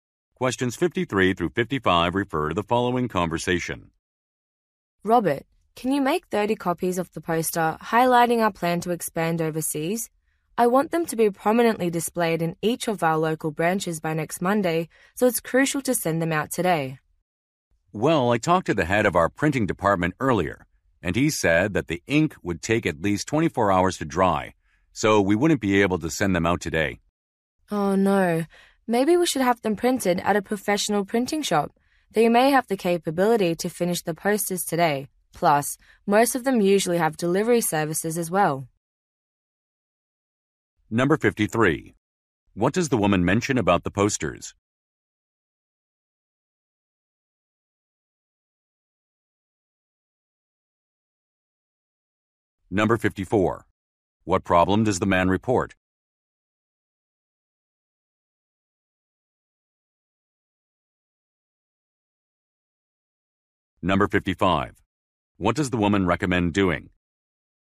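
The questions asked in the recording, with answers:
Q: What does the woman mention about the posters?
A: They must be displayed in local branches by next Monday

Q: What does the woman recommend doing?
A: Having them printed at a professional printing shop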